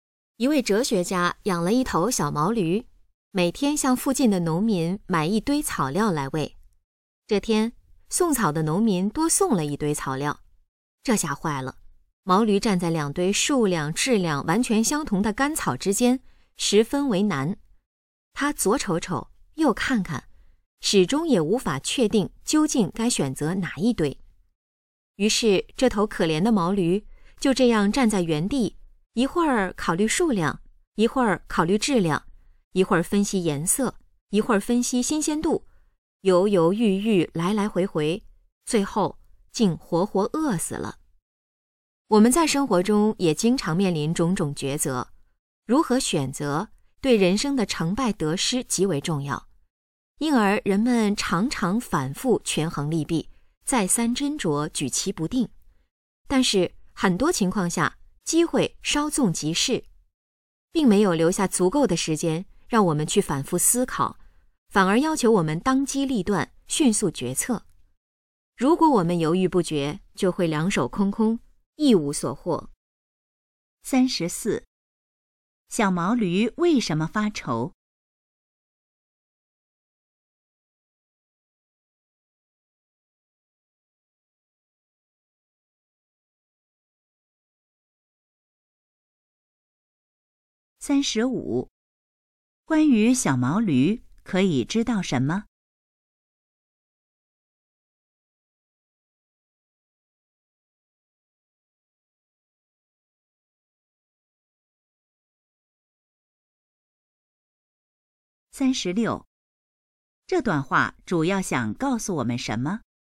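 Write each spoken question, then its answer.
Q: 小毛驴为什么发愁?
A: 不知道该选哪一堆草料

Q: 关于小毛驴,可以知道什么?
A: 最后饿死了

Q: 这段话主要想告诉我们什么?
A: 做选择要当机立断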